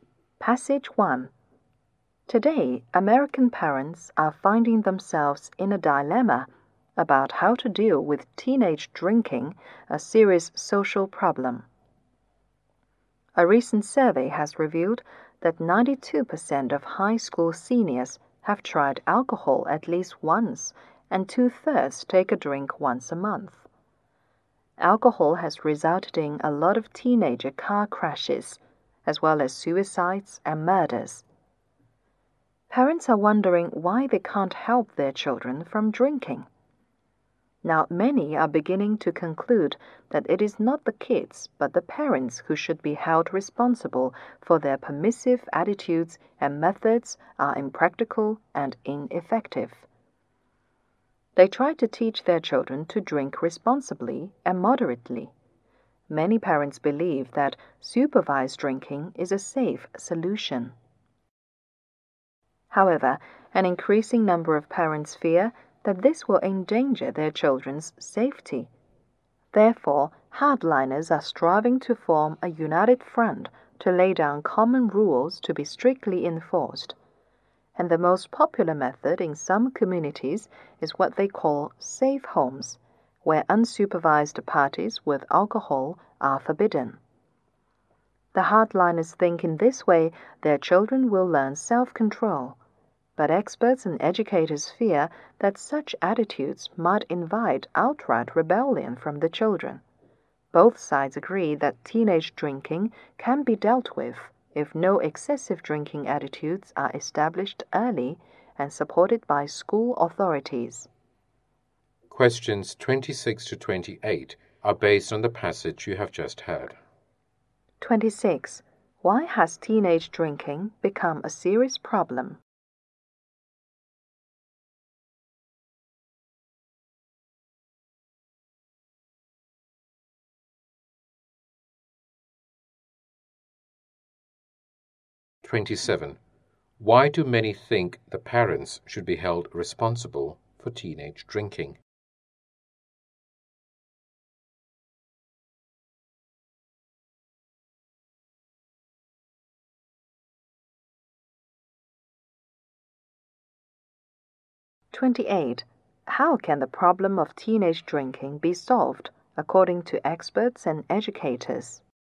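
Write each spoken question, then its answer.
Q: Why do many think the parents should be held responsible for teenage drinking?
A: Because of their permissive attitudes and impractical, ineffective methods

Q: How can the problem of teenage drinking be solved, according to experts and educators?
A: By establishing no-excessive-drinking attitudes early, supported by school authorities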